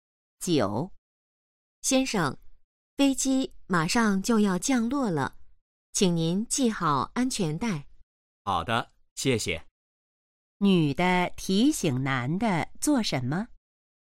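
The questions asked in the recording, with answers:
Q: 女的提醒男的做什么?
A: 系好安全带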